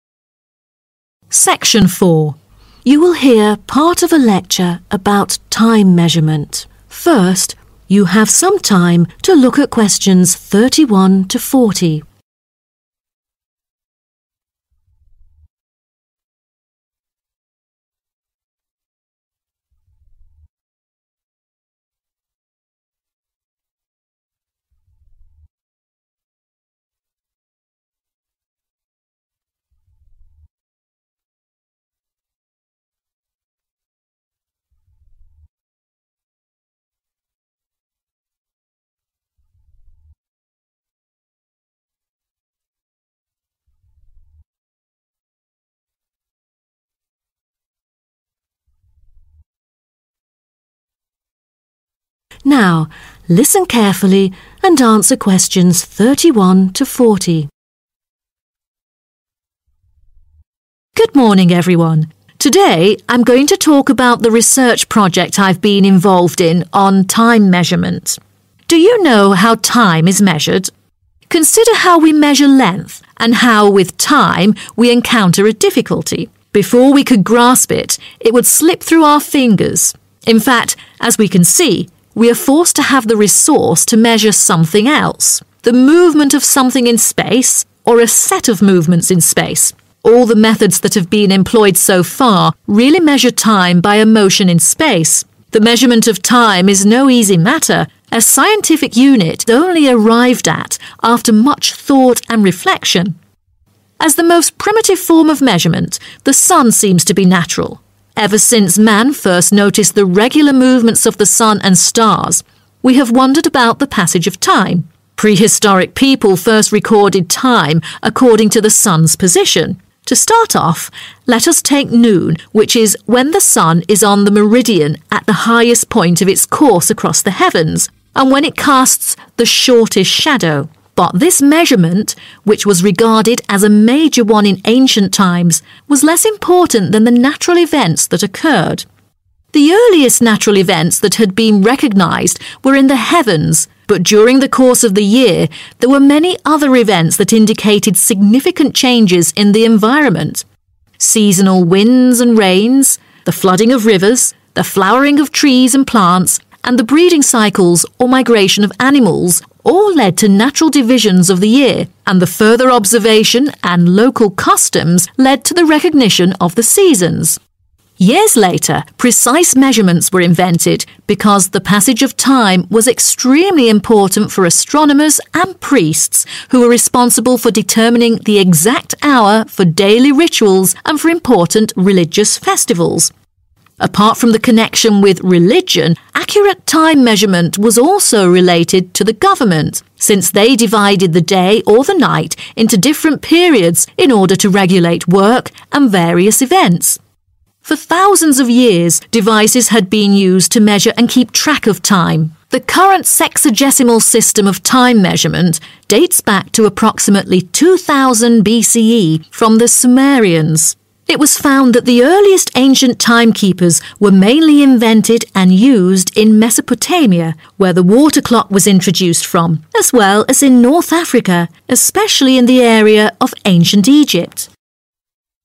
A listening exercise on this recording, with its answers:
Complete the notes below. Write NO MORE THAN TWO WORDS for each answer.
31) - The 31............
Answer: sun's position

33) - 33............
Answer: religion/religions

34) - 34............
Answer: (the) government

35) - The oldest time keepers were discovered in Mesopotamia and 35............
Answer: North Africa